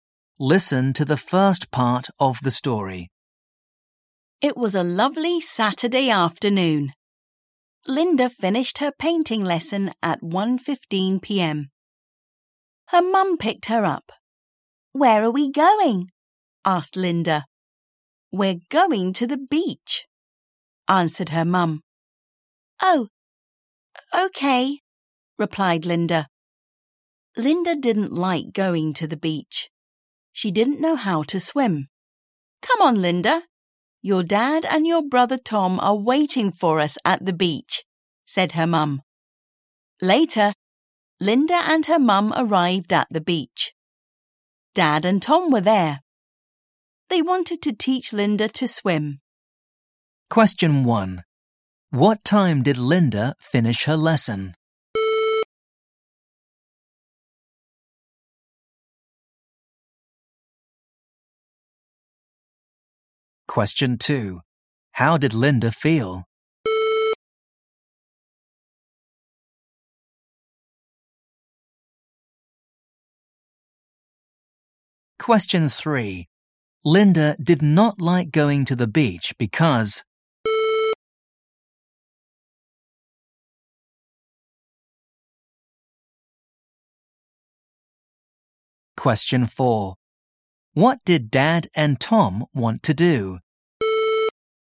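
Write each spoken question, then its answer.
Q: What time did Linda finish her lesson?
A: At 1:15 p.m.

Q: Linda did not like going to the beach because...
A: she didn't know how to swim

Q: What did Dad and Tom want to do?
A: Teach Linda to swim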